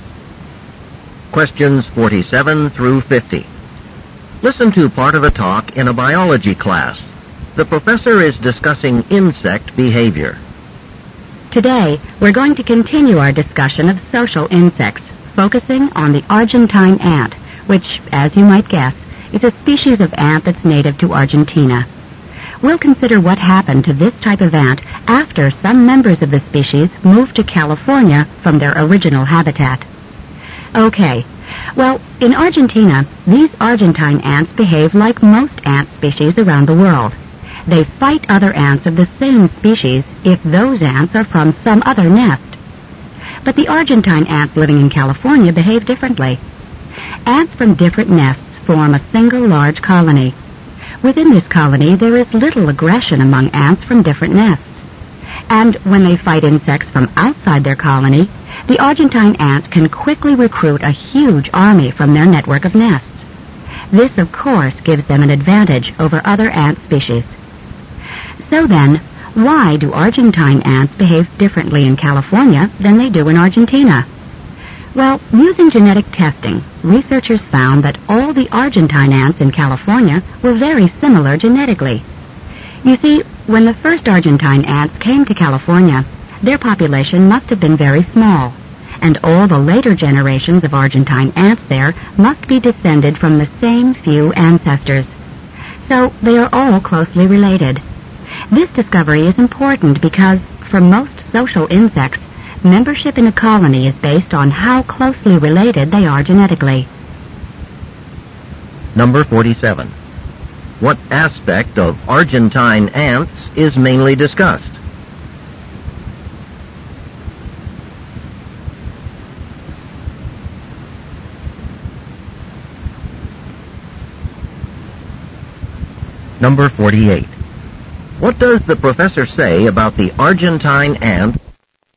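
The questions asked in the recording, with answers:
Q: What aspect of Argentine ants is mainly discussed?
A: Their different behavior in California compared with Argentina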